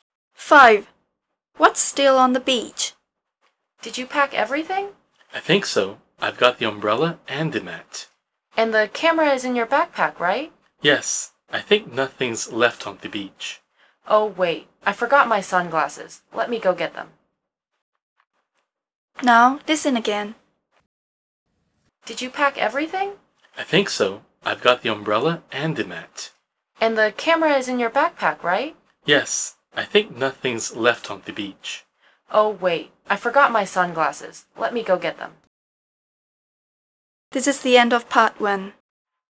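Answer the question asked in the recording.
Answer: Sunglasses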